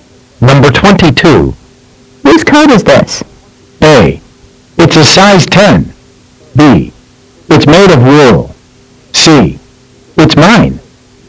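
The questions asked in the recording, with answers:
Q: Whose coat is this?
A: C: It's mine.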